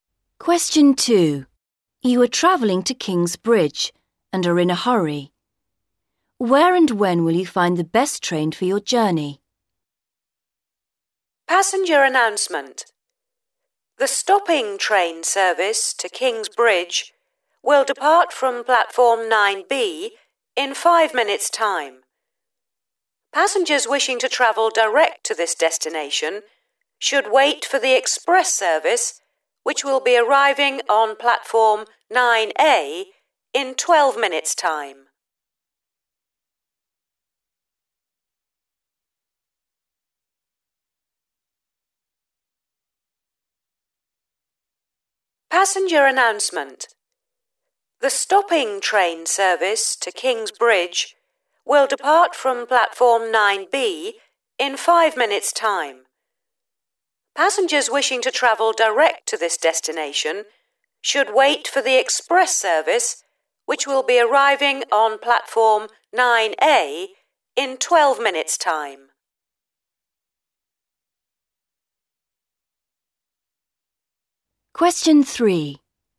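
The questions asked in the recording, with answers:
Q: Where and when will you find the best train for your journey?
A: Platform 9A in 12 minutes' time (express service)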